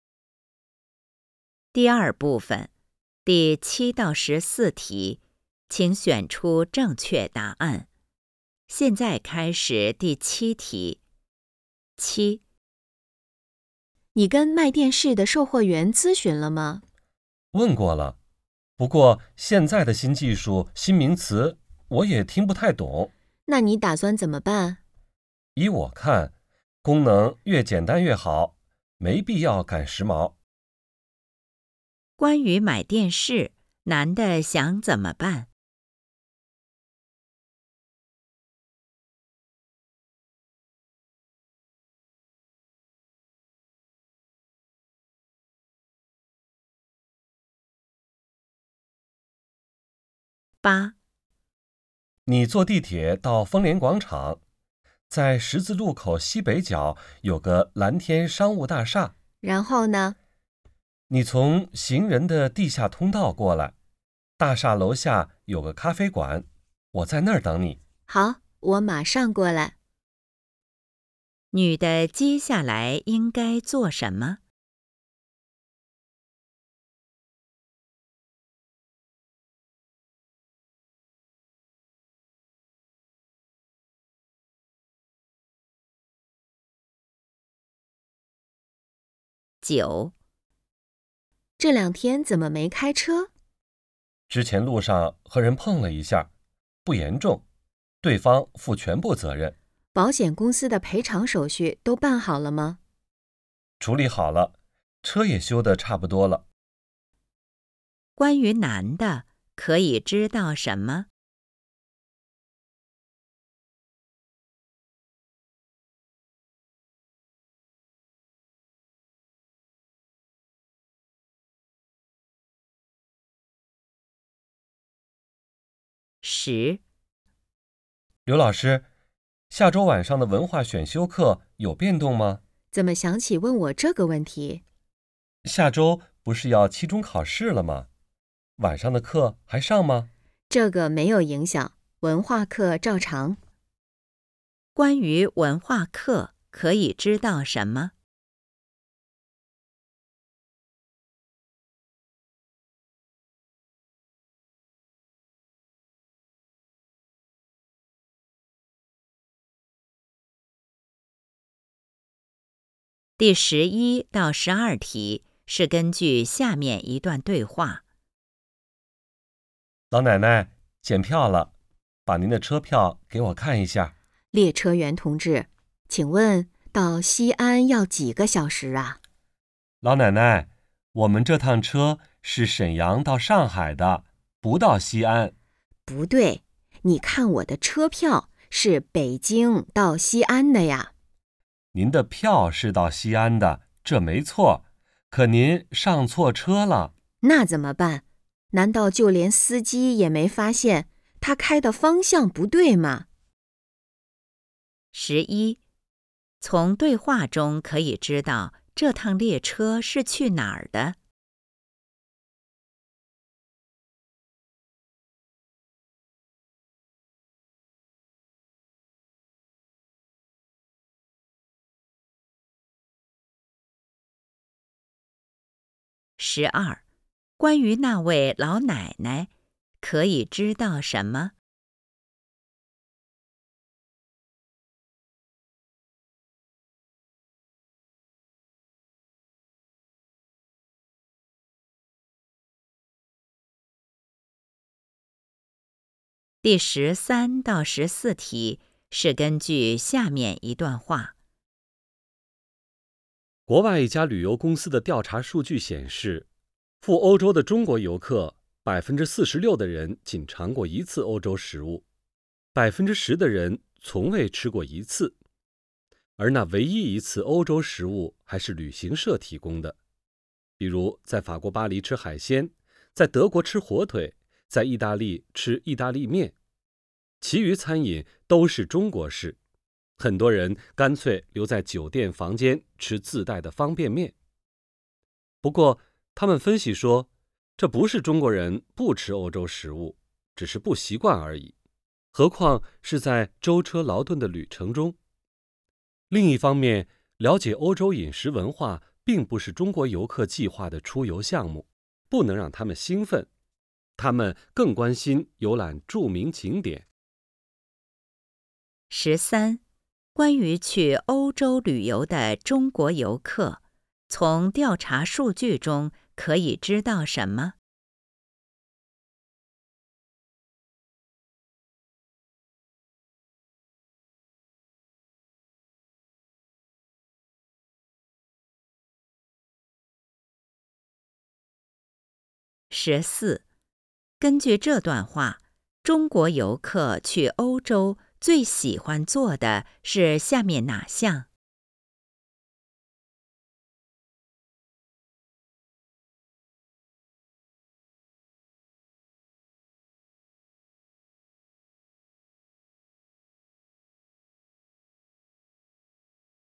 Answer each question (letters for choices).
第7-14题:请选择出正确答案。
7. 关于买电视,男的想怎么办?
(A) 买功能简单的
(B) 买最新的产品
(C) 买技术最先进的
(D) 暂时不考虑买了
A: A

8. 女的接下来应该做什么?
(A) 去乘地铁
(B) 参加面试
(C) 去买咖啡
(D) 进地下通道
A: A

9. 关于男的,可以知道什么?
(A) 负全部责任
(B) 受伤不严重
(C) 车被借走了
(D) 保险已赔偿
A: D

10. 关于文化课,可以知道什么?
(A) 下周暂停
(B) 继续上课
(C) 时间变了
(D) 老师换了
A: B

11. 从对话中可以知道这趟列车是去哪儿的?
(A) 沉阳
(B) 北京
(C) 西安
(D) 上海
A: D

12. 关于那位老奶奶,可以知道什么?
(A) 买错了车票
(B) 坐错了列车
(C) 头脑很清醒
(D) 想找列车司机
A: B

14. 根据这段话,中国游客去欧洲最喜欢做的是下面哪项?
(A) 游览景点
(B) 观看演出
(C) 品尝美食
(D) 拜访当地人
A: A

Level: HSK 5